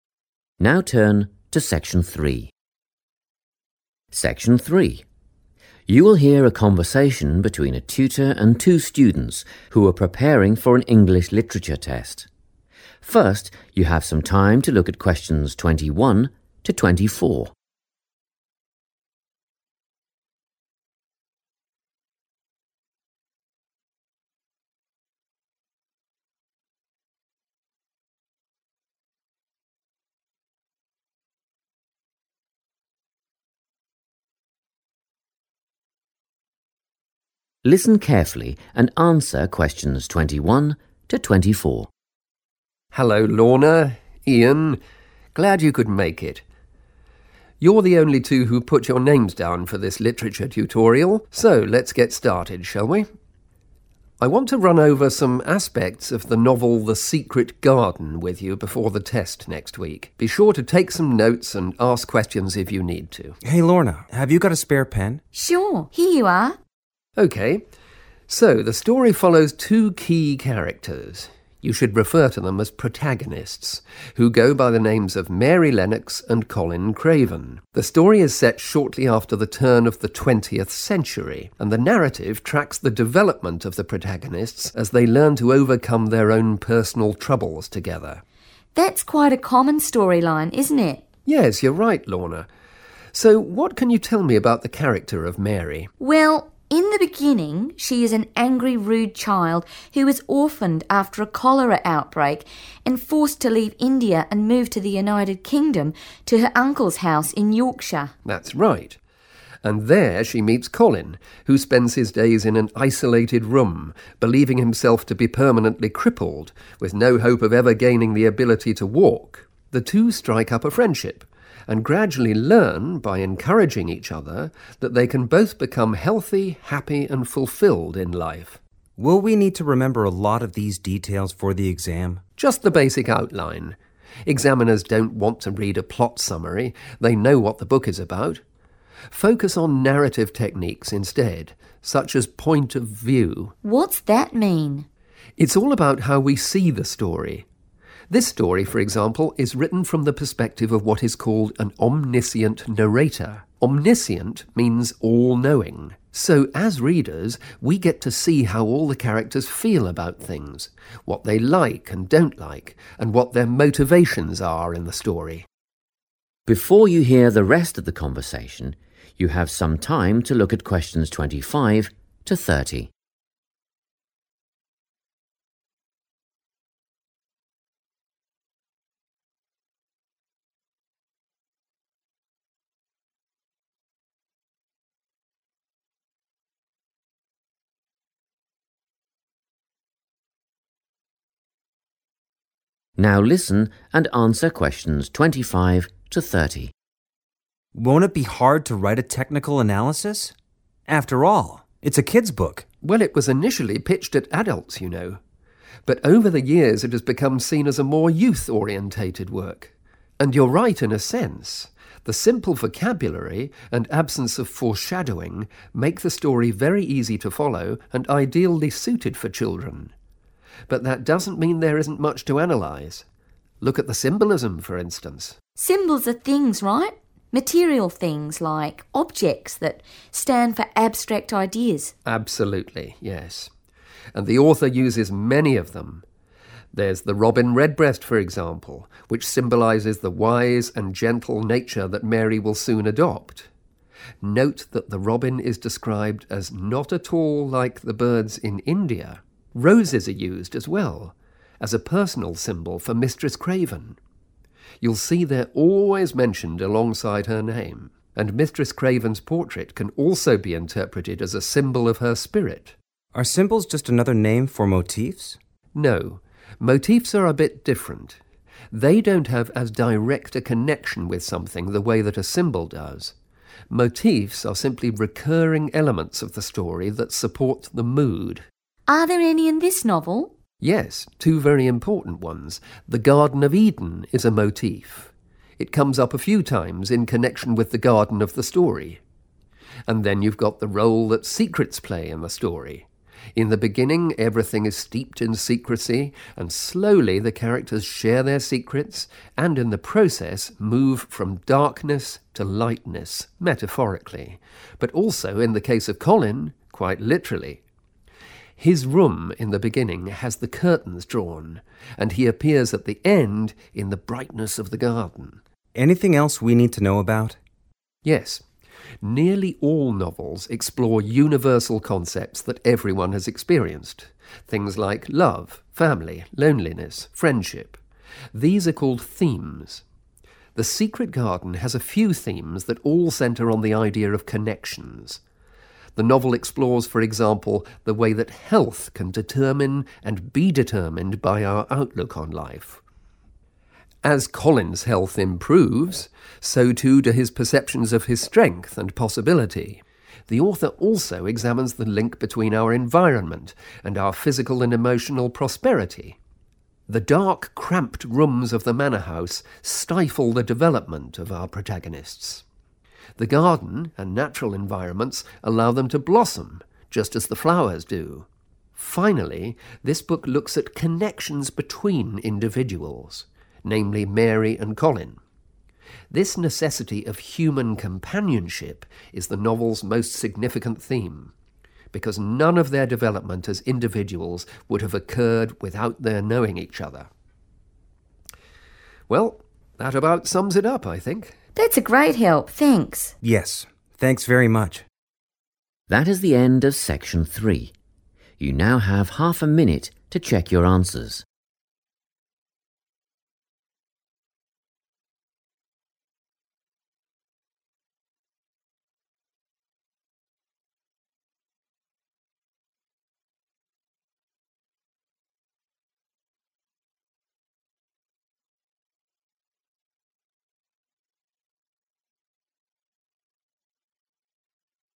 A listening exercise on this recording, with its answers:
Complete the notes below. Write NO MORE THAN THREE WORDS for each answer.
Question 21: Novel:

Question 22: Time period: Early in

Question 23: Plot: Mary → UK – meets Colin who thinks he'll never be able to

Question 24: Point of view: "Omniscient" – narrator knows all about characters' feelings, opinions and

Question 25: Symbols (physical items that represent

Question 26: the robin redbreast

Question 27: secrecy – metaphorical and literal transition from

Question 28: and outlook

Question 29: and well-being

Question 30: individuals and the need for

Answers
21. The Secret Garden
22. the 20th century
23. walk
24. motivations
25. abstract ideas
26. roses
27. darkness to lightness
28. health
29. environment
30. human companionship

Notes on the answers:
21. The transcript shows the teacher telling the students the name of the book they are about to discuss. Answer Explanation: The answer is the name of the book the students are learning about. Reason For Correctness: The correct answer is the title of the story being discussed. At the start of the talk, the teacher names the specific book they will review to help the students prepare for their upcoming test.
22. The transcript says the book is set just after the start of the 1900s, which matches the prompt asking for the time period the story is set in. Answer Explanation: The answer means that the story takes place during the beginning of the 1900s, which is known as the 20th century. Reason For Correctness: The correct answer is confirmed by the tutor's description of when the story happens. He says it is set 'shortly after the turn of the twentieth century.' The phrase 'shortly after the turn' is another way to say 'early in.' In history, the 1900s are called the 'twentieth century,' so that matches the time period needed to complete the note.
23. The transcript describes Colin as someone who stays in a room alone because he believes his body is damaged forever and that he will never be able to stand up and move on his own legs. Answer Explanation: The answer means to move using your legs and feet. Reason For Correctness: The correct answer is 'walk' because the character Colin thinks he is disabled and will never have the physical capability to use his legs for moving. The transcript mentions he thinks he is 'permanently crippled' and has 'no hope' of ever having the 'ability to walk'.
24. The transcript explains that since the narrator knows everything, the readers can see the characters' feelings, what they like or do not like, and the reasons for their behavior. Answer Explanation: The answer means the reasons or goals that explain why the characters act the way they do in the story. Reason For Correctness: The correct answer is 'motivations' because the tutor defines an 'omniscient narrator' as being 'all-knowing.' This means the person telling the story can see inside the characters' minds to understand their feelings, their likes and dislikes (opinions), and their 'motivations,' which are the purposes behind their actions.
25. The transcript shows Lorna asking if symbols are physical objects that represent non-physical concepts, and the teacher confirms that this is correct. Answer Explanation: The answer "abstract ideas" refers to concepts, qualities, or feelings—such as love, freedom, or wisdom—that do not have a physical presence and cannot be touched. Reason For Correctness: The correct answer is "abstract ideas" because Lorna defines symbols as physical objects used to represent these non-physical concepts. The tutor confirms her definition is "absolutely" correct, establishing that in this context, symbols are the material tools used to point toward deeper, abstract meanings.
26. The transcript shows the teacher explaining that roses are used as a special sign (symbol) for a person named Mistress Craven, and they appear in the book whenever she is mentioned. Answer Explanation: The answer roses refers to a specific type of flower used in the story as a special sign to represent a character. Reason For Correctness: The correct answer is roses because the teacher explains what symbolism is and gives specific examples from the book. He mentions 'the robin redbreast', 'roses', and the 'portrait of Mistress Craven' as the three physical items used as symbols. Since the robin and the portrait are already written in the list, roses is the missing item needed to finish the notes.
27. The transcript says that at the start, there are many secrets, but as the characters share them, they change and move from a state of darkness to a state of lightness. Answer Explanation: The answer means that the characters in the story move from a dark, hidden state to a bright, open state, representing both a change in their feelings and their surroundings. Reason For Correctness: The correct answer is chosen because the tutor describes how secrets act as a pattern in the story. This pattern shows a movement from 'darkness' (sadness or hidden things) to 'lightness' (happiness or truth). This change happens in the characters' minds (metaphorically) and in the physical world (literally) when they leave dark rooms for the sunny garden.
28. The transcript says that the story shows how our physical well-being and our mental attitude affect each other. Answer Explanation: The answer refers to the physical and mental state of a person, specifically whether they are well or sick. Reason For Correctness: The correct answer is based on the tutor's explanation of the 'themes' or main ideas in the book. He mentions that the story looks at 'connections,' and the first connection he describes is how a person's physical state or health is linked to their 'outlook,' which means their attitude or way of thinking about life.
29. The transcript says that the writer of the book looks at how the place where characters live (the environment) is connected to how healthy and successful they feel (well-being). Answer Explanation: The answer is environment, which means the place or the surroundings where a person lives or stays. Reason For Correctness: The correct answer is 'environment' because the tutor explains that one of the main themes in the book is the 'connection' between different things. Specifically, the tutor mentions a 'link' (which is another word for connection) between the 'environment' and 'physical and emotional prosperity'. In the notes provided in the task, 'well-being' is used as a synonym for 'prosperity'. Therefore, 'environment' is the missing word that connects to 'well-being'.
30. The transcript explains that the book focuses on how people connect with one another. It says that needing to be with others (human companionship) is the main idea because the characters only got better because they knew each other. Answer Explanation: The answer means being with other people and having friends. Reason For Correctness: The correct answer is extracted from the tutor's explanation of the book's themes, specifically the connection between individuals. The tutor identifies the "necessity of human companionship" as the most important theme because the characters could only grow by being around each other. In the notes, the word "need" is used as a synonym for "necessity".

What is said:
Section 3
You will hear a conversation between a tutor and two students who are preparing for an English literature test. First you have some time to look at questions 21 to 24.
Listen carefully and answer questions 21 to 24
TUTOR: Hello Lorna, Ian. Glad you could make it. You're the only two who put your names down for this literature tutorial so let's get started, shall we? I want to run over some aspects of the novel, The Secret Garden, with you before the test next week. Be sure to take some notes and ask questions if you need to.
IAN: Hey Lorna, have you got a spare pen?
LORNA: Sure, here you are.
TUTOR: Okay, so, the story follows two key characters – you should refer to them as protagonists – who go by the names of Mary Lennox and Colin Craven. The story is set shortly after the turn of the twentieth century, and the narrative tracks the development of the protagonists as they learn to overcome their own personal troubles together.
LORNA: That's quite a common storyline, isn't it?
TUTOR: Yes, you're right, Lorna. So, what can you tell me about the character of Mary?
LORNA: Well, in the beginning she is an angry, rude child who is orphaned after a cholera outbreak and forced to leave India and move to the United Kingdom to her uncle's house in Yorkshire.
TUTOR: That's right – and there she meets Colin who spends his days in an isolated room, believing herself to be permanently crippled with no hope of ever gaining the ability to walk. The two strike up a friendship and gradually learn – by encouraging each other – that they can both become healthy, happy and fulfilled in life.
IAN: Will we need to remember a lot of these details for the exam?
TUTOR: Just the basic outline. Examiners don't want to read a plot summary – they know what the book is about. Focus on narrative techniques instead, such as point of view.
LORNA: What's that mean?
TUTOR: It's all about how we see the story. This story, for example, is written from the perspective of what is called an "omniscient narrator". Omniscient means all-knowing. So, as readers we get to see how all the characters feel about things, what they like and don't like, and what their motivations are in the story.
Before you hear the rest of the conversation, you have some time to look at questions 25 to 30.
Now listen and answer questions 25 to 30.
IAN: Won't it be hard to write a technical analysis? After all, it's a kids' book.
TUTOR: Well, it was initially pitched at adults you know, but over the years it has become seen as a more youth-orientated work. And you're right in a sense – the simple vocabulary and absence of foreshadowing make the story very easy to follow and ideally suited for children. But that doesn't mean there isn't much to analyse. Look at the symbolism, for instance.
LORNA: Symbols are things, right? Material things – like objects – that stand for abstract ideas.
TUTOR: Absolutely, yes. And the author uses many of them. There's the robin redbreast, for example, which symbolises the wise and gentle nature that Mary will soon adopt – note that the robin is described as "not at all like the birds in India". Roses are used as well – as a personal symbol for Mistress Craven – you'll see they're always mentioned alongside her name. And Mistress Craven's portrait can also be interpreted as a symbol of her spirit.
IAN: Are symbols just another name for motifs?
TUTOR: No, motifs are a bit different. They don't have as direct a connection with something the way that a symbol does. Motifs are simply recurring elements of the story that support the mood.
LORNA: Are there any in this novel?
TUTOR: Yes, two very important ones. The Garden of Eden is a motif. It comes up a few times in connection with the garden of the story. And then you've got the role that secrets play in the story. In the beginning, everything is steeped in secrecy, and slowly the characters share their secrets and in the process move from darkness to lightness, metaphorically, but also in the case of Colin, quite literally. His room in the beginning has the curtains drawn, and he appears at the end in the brightness of the garden.
IAN: Anything else we need to know about?
TUTOR: Yes. Nearly all novels explore universal concepts that everyone has experienced – things like love, family, loneliness, friendship. These are called themes. The Secret Garden has a few themes that all centre on the idea of connections. The novel explores, for example, the way that health can determine and be determined by our outlook on life. As Colin's health improves, so too do his perceptions of his strength and possibility. The author also examines the link between our environment and our physical and emotional prosperity. The dark, cramped rooms of the manor house stifle the development of our protagonists; the garden and natural environments allow them to blossom, just as the flowers do. Finally, this book looks at connections between individuals, namely Mary and Colin. This necessity of human companionship is the novel's most significant theme – because none of their development as individuals would have occurred without their knowing each other. Well, that about sums it up, I think.
LORNA: That's a great help, thanks.
IAN: Yes, thanks very much.
NARRATOR:
That is the end of section 3. You now have half a minute to check your answers.